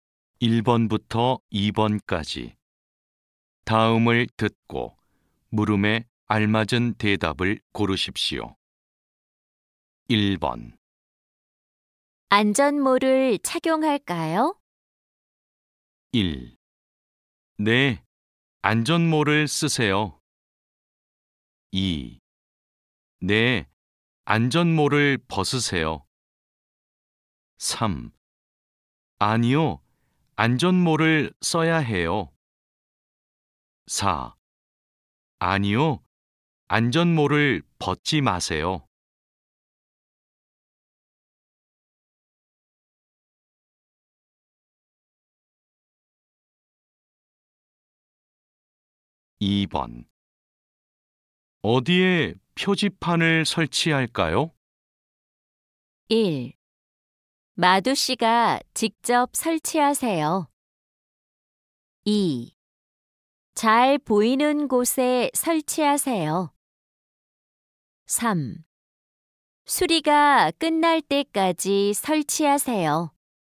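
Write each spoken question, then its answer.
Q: 안전모를 착용할까요?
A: 1: 네, 안전모를 쓰세요.

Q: 어디에 표지판을 설치할까요?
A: 2: 잘 보이는 곳에 설치하세요.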